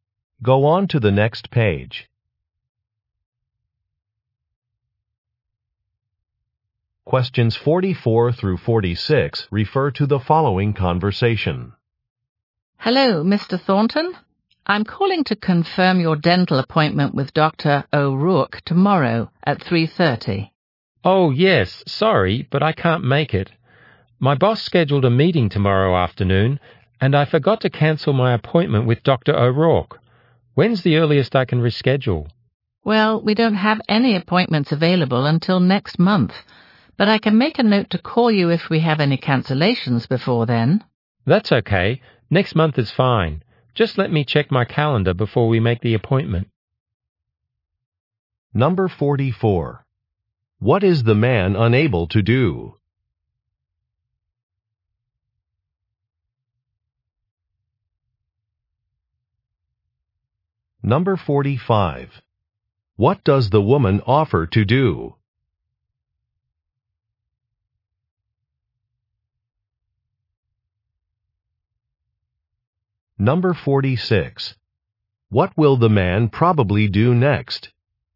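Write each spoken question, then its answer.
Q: What is the man unable to do?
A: Go to his dental appointment tomorrow

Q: What does the woman offer to do?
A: Call him if there is a cancellation

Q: What will the man probably do next?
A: Check his calendar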